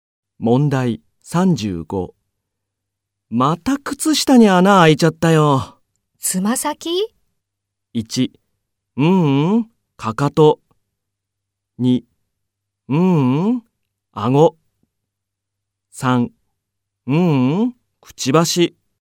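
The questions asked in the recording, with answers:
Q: また靴下に穴開いちゃったよ。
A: 1: かかと。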